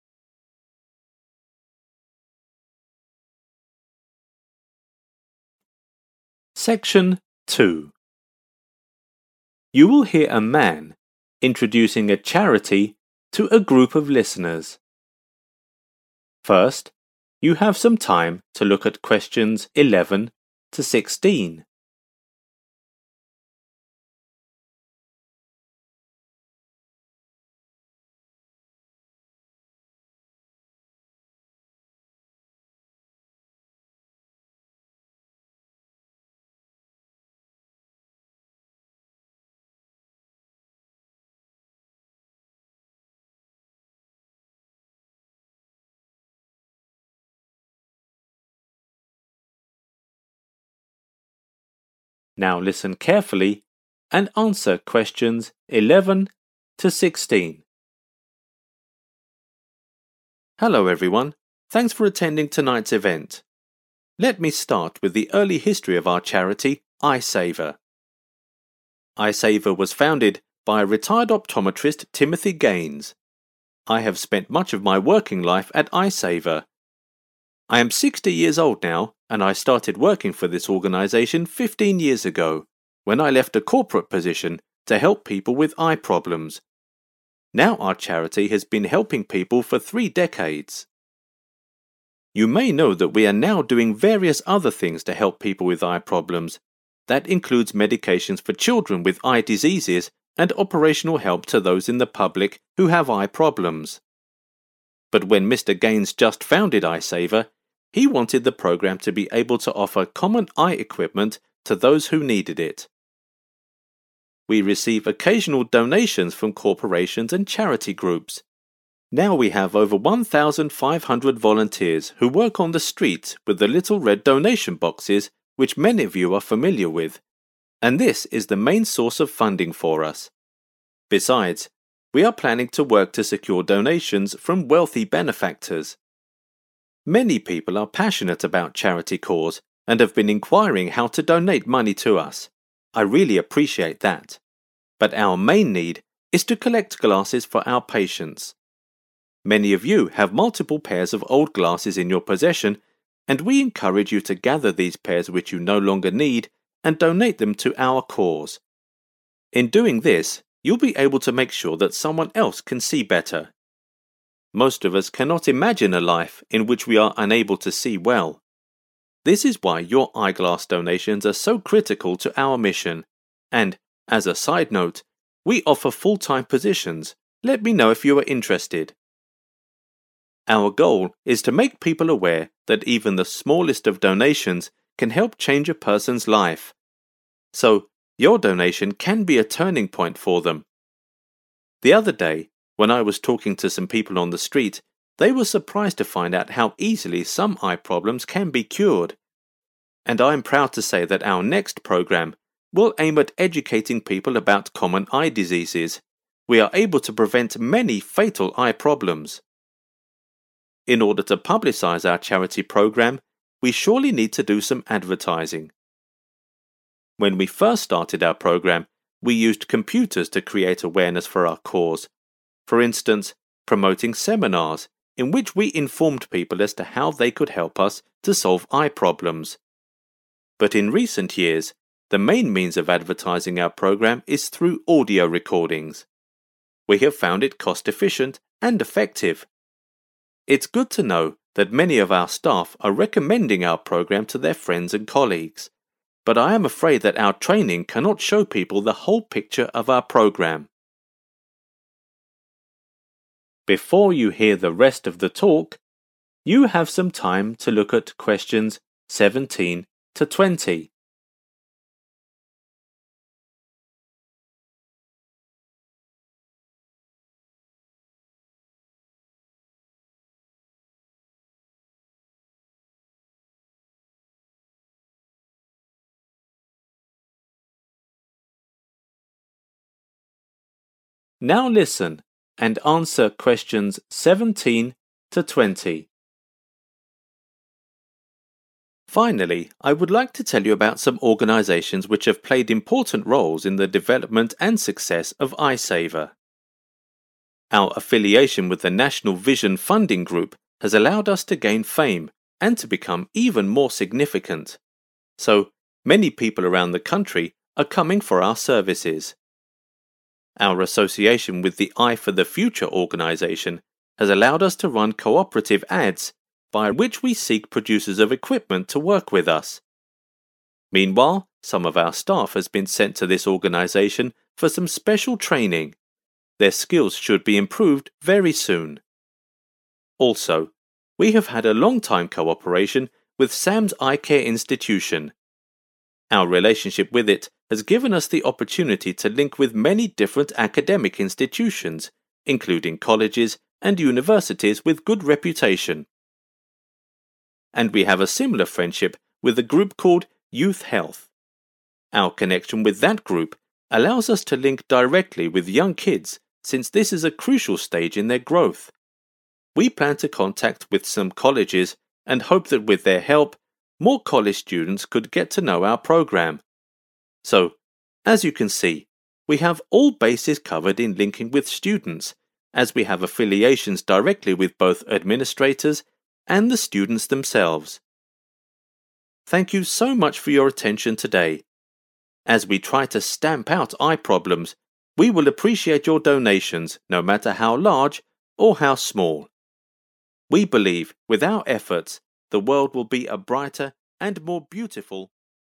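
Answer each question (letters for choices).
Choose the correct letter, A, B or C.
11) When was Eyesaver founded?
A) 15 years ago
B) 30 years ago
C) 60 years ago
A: B

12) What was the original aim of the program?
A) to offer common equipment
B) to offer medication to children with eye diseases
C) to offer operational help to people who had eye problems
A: A

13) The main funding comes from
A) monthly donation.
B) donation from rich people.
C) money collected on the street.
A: C

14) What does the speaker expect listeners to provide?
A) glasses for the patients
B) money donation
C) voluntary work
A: A

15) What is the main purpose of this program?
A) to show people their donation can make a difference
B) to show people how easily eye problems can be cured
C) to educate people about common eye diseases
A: A

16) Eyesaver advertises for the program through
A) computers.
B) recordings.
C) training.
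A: B

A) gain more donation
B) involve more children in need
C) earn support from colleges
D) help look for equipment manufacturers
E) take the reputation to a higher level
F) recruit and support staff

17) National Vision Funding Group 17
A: E

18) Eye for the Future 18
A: D

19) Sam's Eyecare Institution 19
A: C

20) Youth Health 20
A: B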